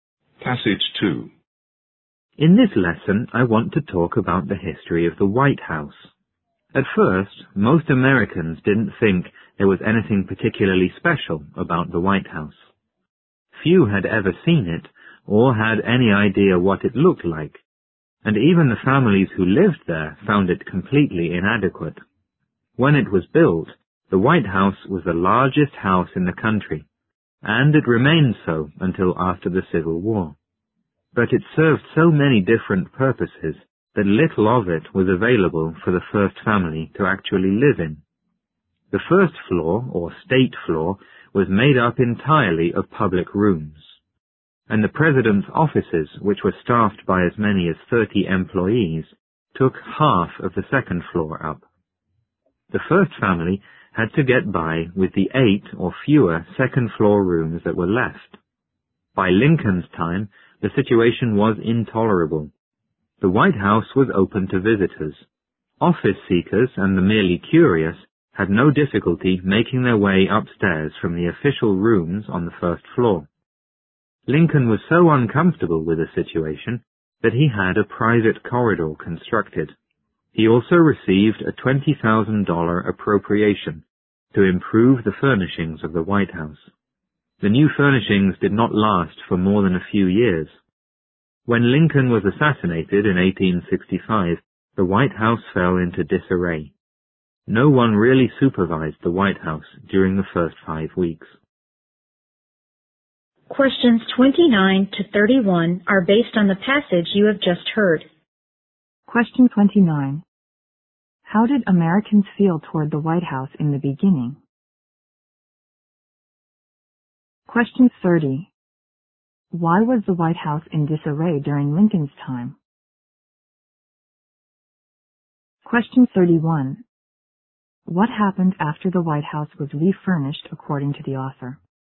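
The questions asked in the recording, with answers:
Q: How did Americans feel toward the White House in the beginning?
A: They didn't think it was anything special

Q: What happened after the White House was refurnished according to the author?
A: The new furnishings lasted only a few years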